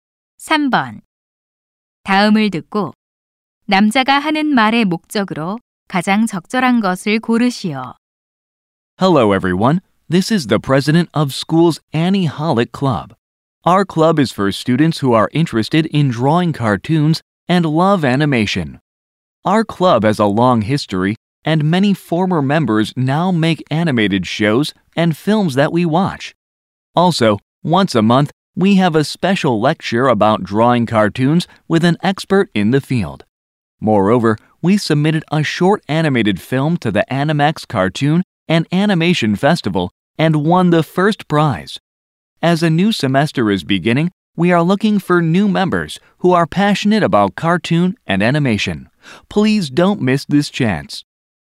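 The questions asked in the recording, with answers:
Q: 다음을 듣고 남자가 하는 말의 목적으로 가장 적절한 것을 고르시오.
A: 애니메이션 동아리 신입 회원을 모집하려고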